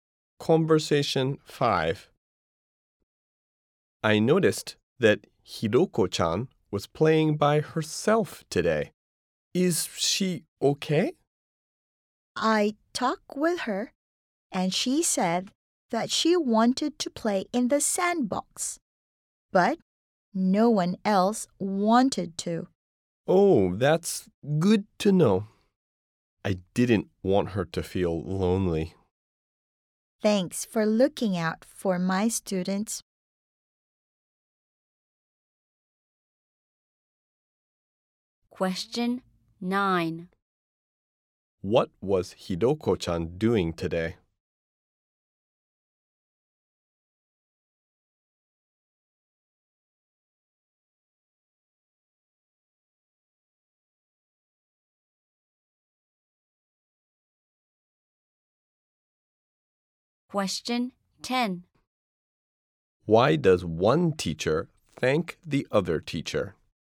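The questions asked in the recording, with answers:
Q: What was Hiroko-chan doing today?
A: Playing by herself in the sandbox

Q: Why does one teacher thank the other teacher?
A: For looking out for her students (checking on Hiroko-chan)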